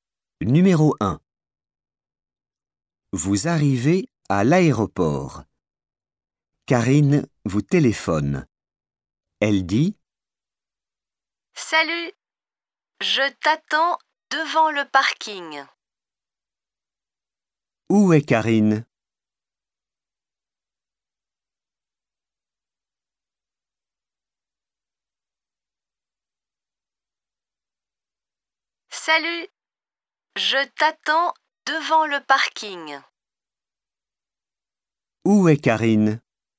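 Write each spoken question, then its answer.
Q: Où est Karine?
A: Devant le parking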